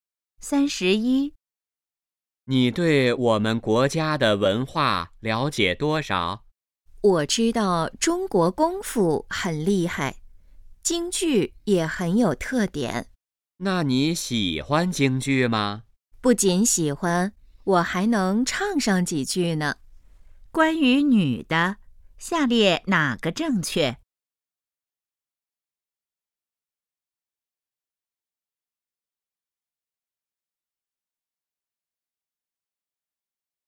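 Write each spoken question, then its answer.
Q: 下列哪个正确?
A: 女的喜欢京剧,还会唱几句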